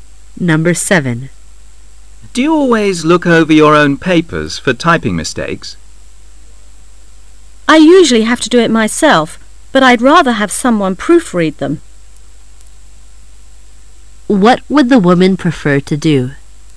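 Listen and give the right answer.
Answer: Have someone else proofread her papers

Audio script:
[解析] M:Do you always look over your own papers for typing mistakes? W:I usually have to do it myself.But I'd rather have someone proofread them. Q:What would the woman prefer to do?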